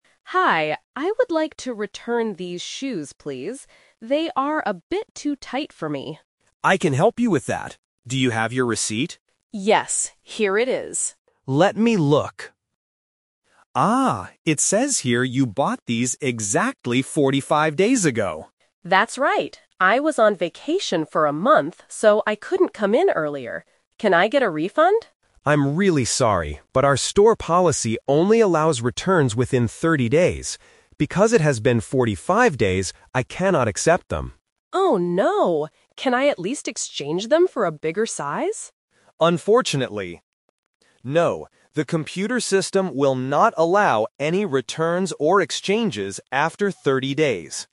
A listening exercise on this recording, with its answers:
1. What item does the customer want to return?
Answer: A pair of shoes.

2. Why couldn't the customer come to the store earlier?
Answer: She was on vacation.

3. How many days does the store give customers to return things?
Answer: 30 days.

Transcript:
Customer: Hi, I would like to return these shoes, please. They are a bit too tight for me.
Staff: I can help you with that. Do you have your receipt?
Customer: Yes, here it is.
Staff: Let me look... Ah, it says here you bought these exactly 45 days ago.
Customer: That's right. I was on vacation for a month, so I couldn't come in earlier. Can I get a refund?
Staff: I'm really sorry, but our store policy only allows returns within 30 days. Because it has been 45 days, I cannot accept them.
Customer: Oh no. Can I at least exchange them for a bigger size?
Staff: Unfortunately, no. The computer system will not allow any returns or exchanges after 30 days.